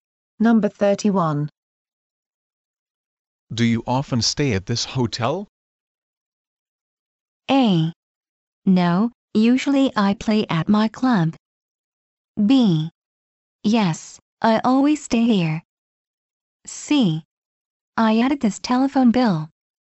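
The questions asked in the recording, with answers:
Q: Do you often stay at this hotel?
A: B: Yes, I always stay here.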